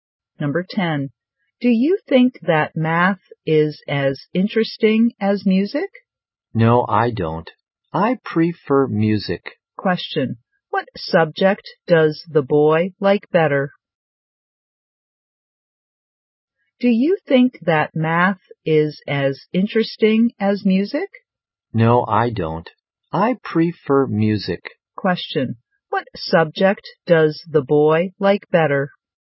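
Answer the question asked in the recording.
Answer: Music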